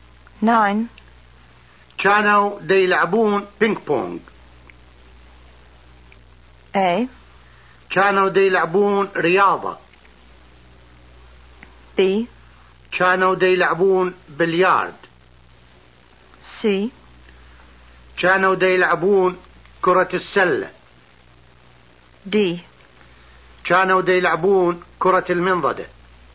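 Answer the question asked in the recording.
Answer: D: كانوا دي يلعبون كرة المنضدة.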